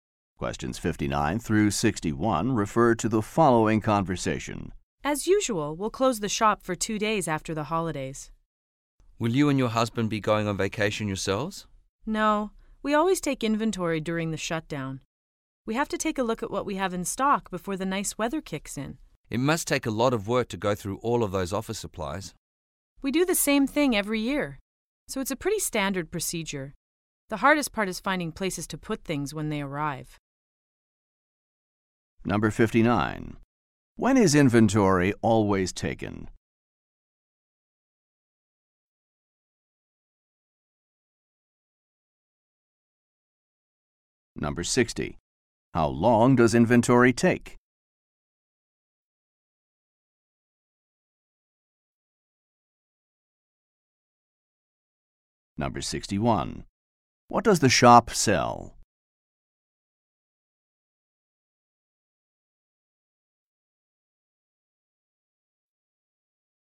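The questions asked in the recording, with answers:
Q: When is inventory always taken?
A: During the two-day shutdown after the holidays

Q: What does the shop sell?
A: Office supplies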